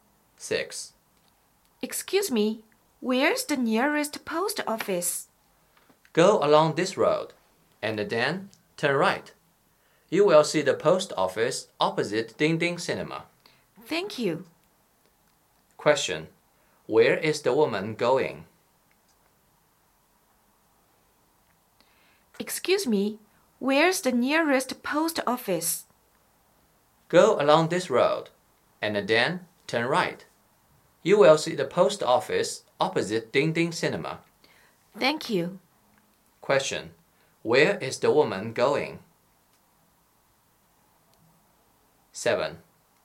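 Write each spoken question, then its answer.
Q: Question, where is the woman going?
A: To the nearest post office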